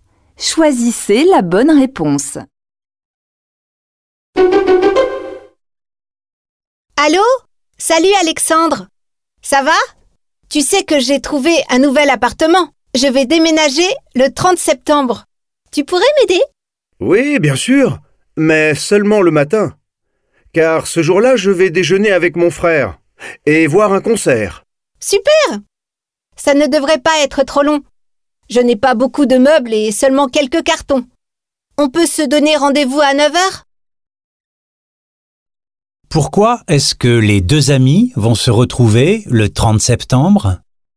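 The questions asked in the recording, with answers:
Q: Pourquoi est-ce que les deux amis vont se retrouver le 30 septembre?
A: Pour déménager (Alexandre va aider son ami à déménager)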